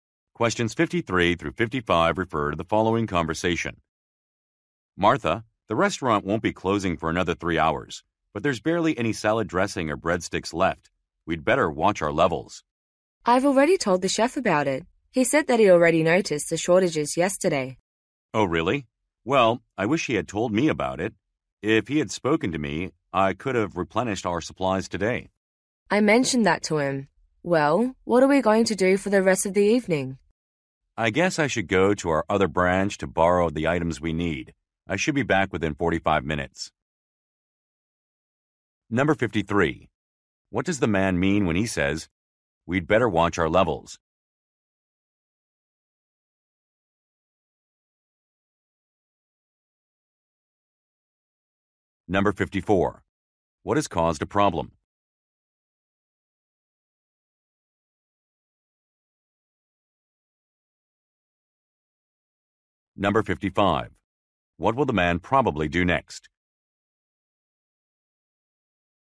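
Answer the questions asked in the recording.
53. Supplies are running low
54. The chef didn't report the shortages
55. Go to another branch to borrow supplies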